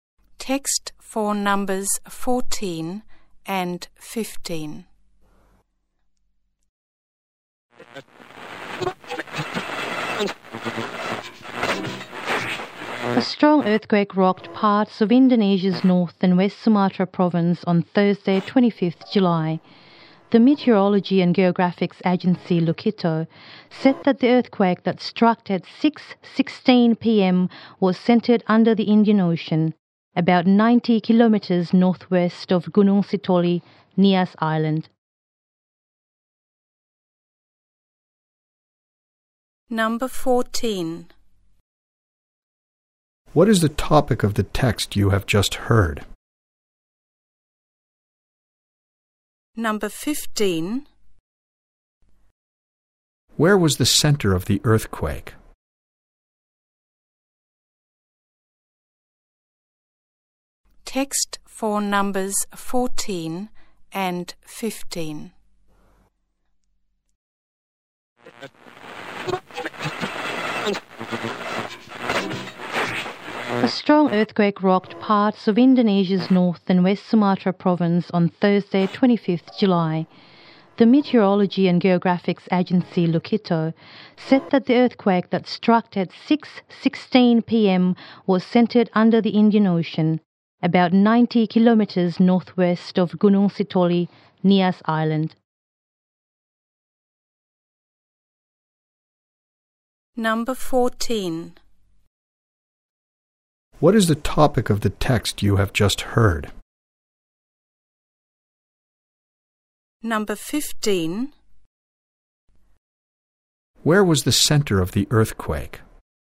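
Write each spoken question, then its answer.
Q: What is the topic of the text you have just heard?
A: A strong earthquake in North and West Sumatra

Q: Where was the center of the earthquake?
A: Under the Indian Ocean, about 90 km northwest of Gunung Sitoli, Nias Island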